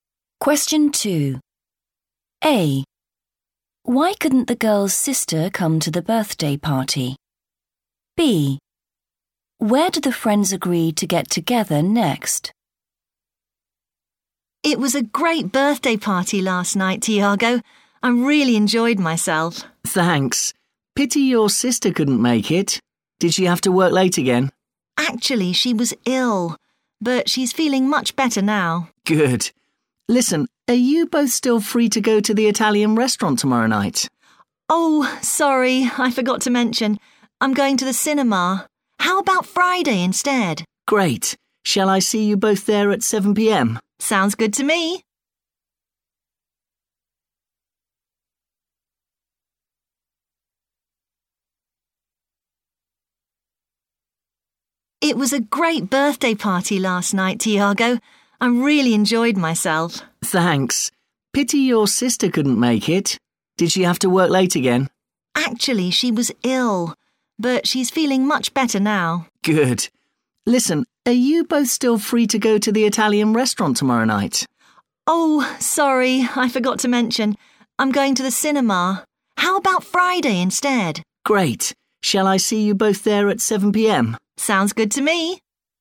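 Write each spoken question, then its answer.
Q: Why couldn't the girl's sister come to the birthday party?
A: she was ill

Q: Where did the friends agree to get together next?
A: (the) Italian restaurant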